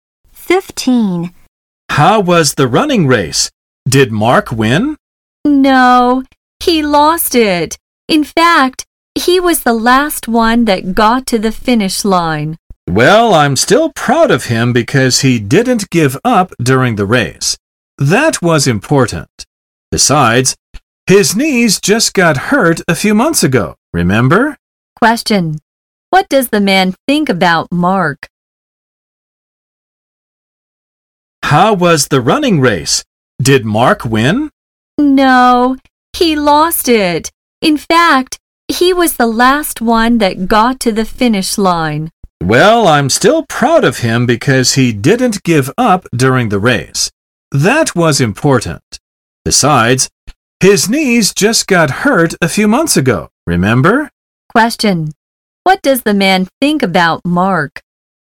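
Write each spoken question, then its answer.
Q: What does the man think about Mark?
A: He's proud of Mark for not giving up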